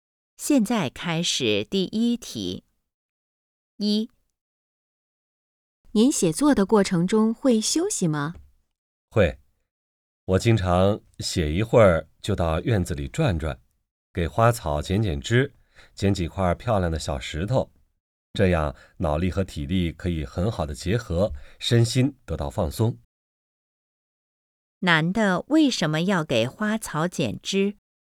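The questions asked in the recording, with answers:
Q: 男的为什么要给花草剪枝?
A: 为了休息放松,让脑力和体力结合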